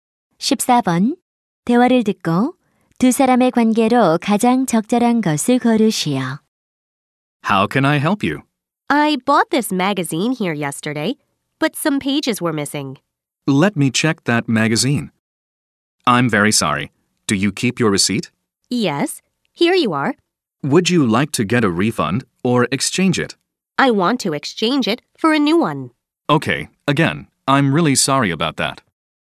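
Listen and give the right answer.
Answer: 점원과 손님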